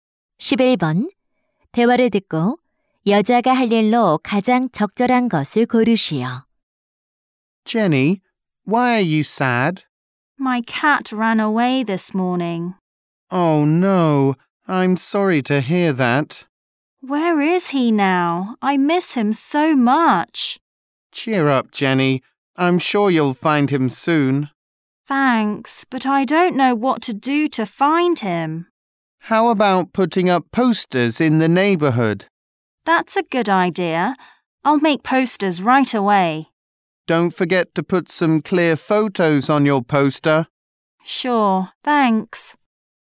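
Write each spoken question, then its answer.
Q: 대화를 듣고 여자가 할 일로 가장 적절한 것을 고르시오.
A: 포스터 만들기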